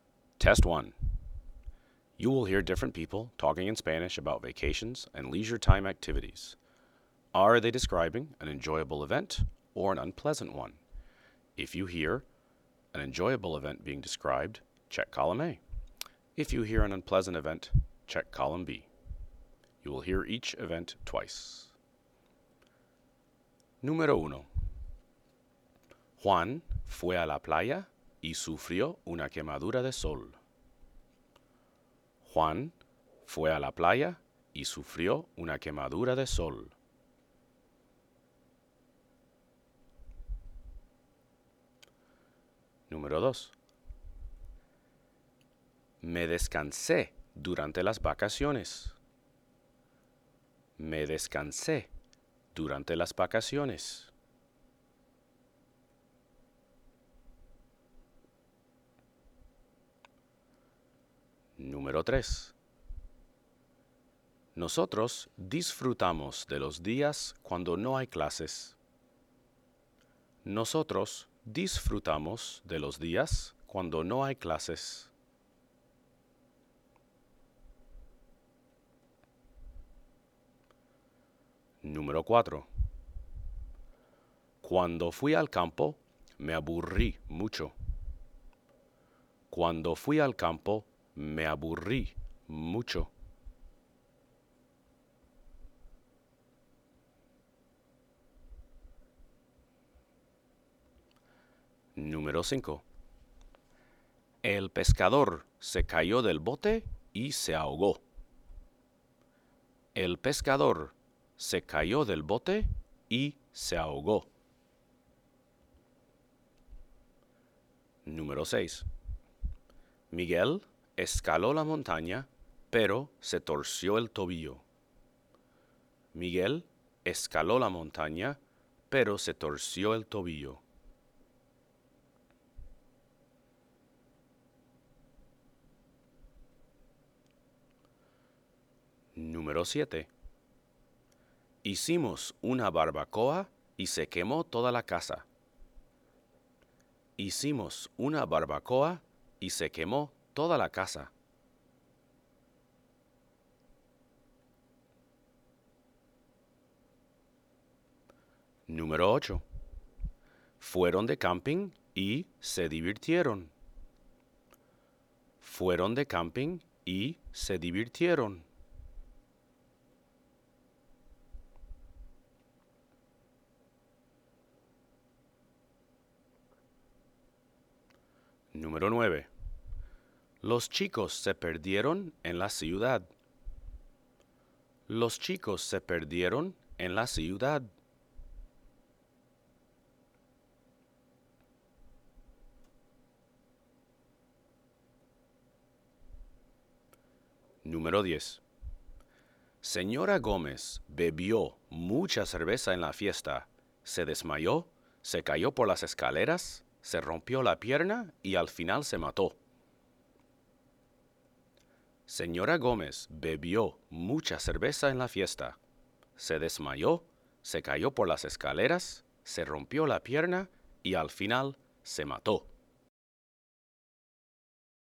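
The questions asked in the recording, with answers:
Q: Juan fue a la playa y sufrió una quemadura de sol.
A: B: unpleasant

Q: Me descansé durante las vacaciones.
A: A: enjoyable

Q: Nosotros disfrutamos de los días cuando no hay clases.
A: A: enjoyable

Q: Cuando fui al campo, me aburrí mucho.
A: B: unpleasant

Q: El pescador se cayó del bote y se ahogó.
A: B: unpleasant

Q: Miguel escaló la montaña, pero se torció el tobillo.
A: B: unpleasant

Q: Hicimos una barbacoa y se quemó toda la casa.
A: B: unpleasant

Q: Fueron de camping y se divirtieron.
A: A: enjoyable

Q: Los chicos se perdieron en la ciudad.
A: B: unpleasant

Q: Señora Gómez bebió mucha cerveza en la fiesta.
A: B: unpleasant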